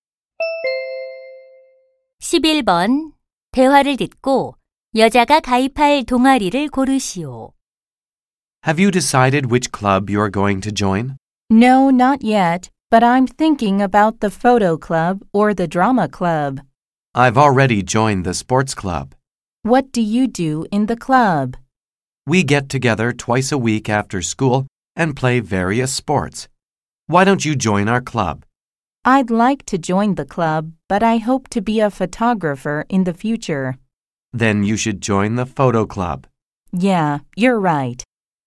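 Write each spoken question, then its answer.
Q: 대화를 듣고 여자가 가입할 동아리를 고르시오.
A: 사진 동아리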